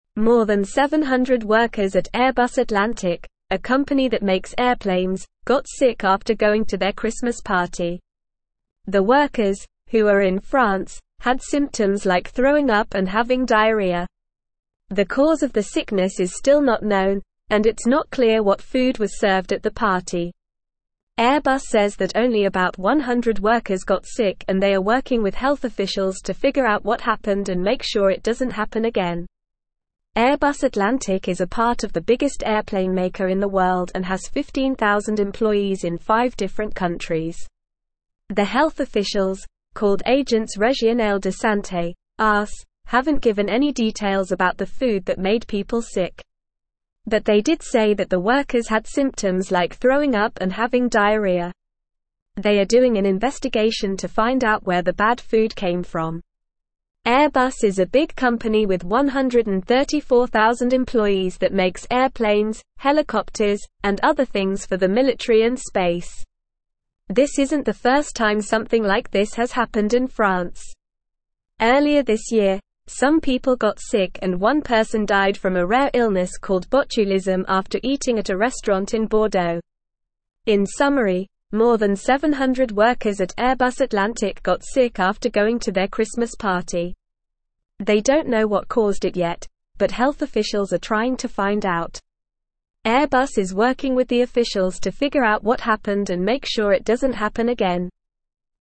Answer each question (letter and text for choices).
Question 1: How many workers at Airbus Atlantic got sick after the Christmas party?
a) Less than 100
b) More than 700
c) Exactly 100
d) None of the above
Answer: b) More than 700

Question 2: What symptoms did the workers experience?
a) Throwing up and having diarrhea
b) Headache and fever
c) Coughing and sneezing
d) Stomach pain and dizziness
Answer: a) Throwing up and having diarrhea

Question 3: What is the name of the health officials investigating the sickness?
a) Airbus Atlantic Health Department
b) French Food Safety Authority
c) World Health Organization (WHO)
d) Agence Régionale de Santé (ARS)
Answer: d) Agence Régionale de Santé (ARS)

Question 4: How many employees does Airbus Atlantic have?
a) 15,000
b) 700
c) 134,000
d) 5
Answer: a) 15,000

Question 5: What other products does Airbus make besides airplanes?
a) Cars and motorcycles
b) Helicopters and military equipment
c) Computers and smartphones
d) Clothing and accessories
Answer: b) Helicopters and military equipment

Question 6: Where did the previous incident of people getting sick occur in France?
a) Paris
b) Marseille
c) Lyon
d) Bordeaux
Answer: d) Bordeaux

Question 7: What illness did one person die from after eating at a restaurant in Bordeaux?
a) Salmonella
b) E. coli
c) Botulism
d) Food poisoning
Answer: c) Botulism

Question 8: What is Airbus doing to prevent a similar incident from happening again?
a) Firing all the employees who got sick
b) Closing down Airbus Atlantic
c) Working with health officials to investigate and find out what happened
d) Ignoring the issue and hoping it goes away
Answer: c) Working with health officials to investigate and find out what happened

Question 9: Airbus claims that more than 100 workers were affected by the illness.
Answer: False

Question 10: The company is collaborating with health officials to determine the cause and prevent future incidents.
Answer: True

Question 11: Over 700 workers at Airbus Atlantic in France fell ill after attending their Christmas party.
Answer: True

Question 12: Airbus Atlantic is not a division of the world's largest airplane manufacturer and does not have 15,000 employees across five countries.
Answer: False

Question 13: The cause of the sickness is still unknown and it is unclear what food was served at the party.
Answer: True

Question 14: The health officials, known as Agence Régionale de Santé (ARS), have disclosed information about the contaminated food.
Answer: False

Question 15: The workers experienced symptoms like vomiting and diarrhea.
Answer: True

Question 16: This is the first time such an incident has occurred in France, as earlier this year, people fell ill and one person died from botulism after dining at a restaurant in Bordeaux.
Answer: False

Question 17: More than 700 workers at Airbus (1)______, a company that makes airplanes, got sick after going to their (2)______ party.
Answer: Atlantic

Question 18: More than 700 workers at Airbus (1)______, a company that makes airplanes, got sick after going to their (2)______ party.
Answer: Christmas

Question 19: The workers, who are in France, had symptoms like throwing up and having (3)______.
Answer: diarrhea

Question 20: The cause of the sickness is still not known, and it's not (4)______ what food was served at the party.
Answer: clear

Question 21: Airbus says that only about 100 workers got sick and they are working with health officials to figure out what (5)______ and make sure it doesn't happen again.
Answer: happened

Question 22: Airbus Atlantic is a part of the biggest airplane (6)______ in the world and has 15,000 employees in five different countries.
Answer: maker

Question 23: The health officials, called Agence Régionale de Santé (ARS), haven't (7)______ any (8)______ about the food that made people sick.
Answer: given

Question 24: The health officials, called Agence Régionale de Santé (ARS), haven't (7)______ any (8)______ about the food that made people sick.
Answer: details

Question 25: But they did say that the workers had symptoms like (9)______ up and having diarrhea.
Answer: throwing

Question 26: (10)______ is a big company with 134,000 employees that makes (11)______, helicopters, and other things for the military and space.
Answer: Airbus

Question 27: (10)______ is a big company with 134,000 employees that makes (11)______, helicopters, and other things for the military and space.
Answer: airplanes

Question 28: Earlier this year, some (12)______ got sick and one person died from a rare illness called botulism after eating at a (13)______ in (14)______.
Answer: people

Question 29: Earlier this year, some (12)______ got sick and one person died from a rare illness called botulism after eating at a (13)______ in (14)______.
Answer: restaurant

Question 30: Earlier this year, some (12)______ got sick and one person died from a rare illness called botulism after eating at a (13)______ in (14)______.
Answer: Bordeaux

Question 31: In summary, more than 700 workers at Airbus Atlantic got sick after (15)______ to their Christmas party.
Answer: going

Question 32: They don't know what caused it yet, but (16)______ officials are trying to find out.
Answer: health

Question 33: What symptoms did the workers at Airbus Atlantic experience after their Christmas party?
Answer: The workers at Airbus Atlantic experienced symptoms like throwing up and having diarrhea.

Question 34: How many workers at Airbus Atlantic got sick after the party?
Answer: More than 700 workers at Airbus Atlantic got sick after the party.

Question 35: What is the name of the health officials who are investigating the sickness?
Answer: The health officials investigating the sickness are called Agence Régionale de Santé (ARS).

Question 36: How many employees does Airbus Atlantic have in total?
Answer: Airbus Atlantic has 15,000 employees in total.

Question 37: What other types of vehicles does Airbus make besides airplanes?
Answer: Besides airplanes, Airbus also makes helicopters and other things for the military and space.

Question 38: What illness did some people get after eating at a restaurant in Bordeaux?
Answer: Some people got sick with a rare illness called botulism after eating at a restaurant in Bordeaux.

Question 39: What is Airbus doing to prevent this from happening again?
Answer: Airbus is working with health officials to figure out what happened and make sure it doesn't happen again.

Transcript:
More than 700 workers at Airbus Atlantic, a company that makes airplanes, got sick after going to their Christmas party. The workers, who are in France, had symptoms like throwing up and having diarrhea. The cause of the sickness is still not known, and it's not clear what food was served at the party. Airbus says that only about 100 workers got sick and they are working with health officials to figure out what happened and make sure it doesn't happen again.
Airbus Atlantic is a part of the biggest airplane maker in the world and has 15,000 employees in five different countries. The health officials, called Agence Régionale de Santé (ARS), haven't given any details about the food that made people sick. But they did say that the workers had symptoms like throwing up and having diarrhea. They are doing an investigation to find out where the bad food came from.
Airbus is a big company with 134,000 employees that makes airplanes, helicopters, and other things for the military and space. This isn't the first time something like this has happened in France. Earlier this year, some people got sick and one person died from a rare illness called botulism after eating at a restaurant in Bordeaux.
They don't know what caused it yet, but health officials are trying to find out.

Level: Level 3